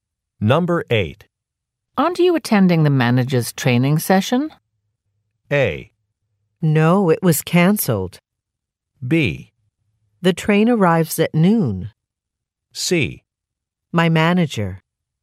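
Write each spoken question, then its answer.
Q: Aren't you attending the manager's training session?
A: A: No, it was cancelled.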